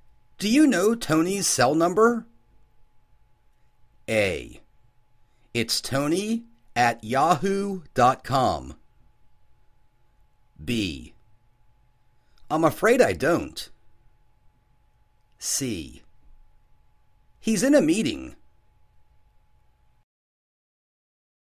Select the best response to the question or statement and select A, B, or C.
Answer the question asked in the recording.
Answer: I'm afraid I don't.